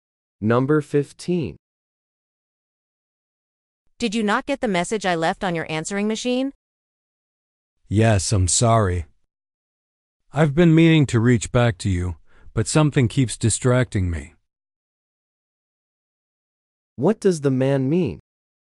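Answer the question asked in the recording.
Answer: He got the message but hasn't returned the call yet.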